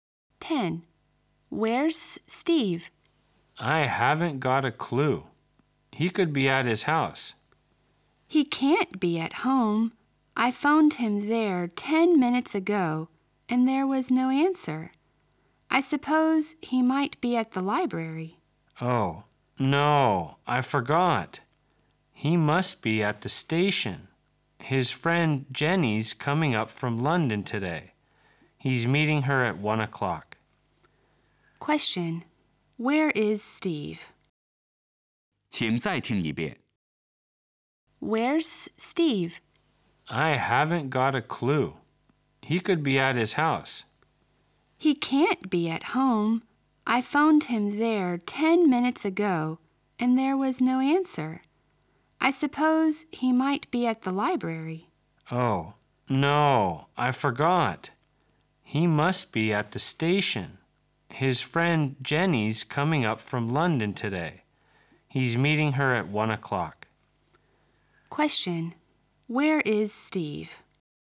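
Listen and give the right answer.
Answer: At the station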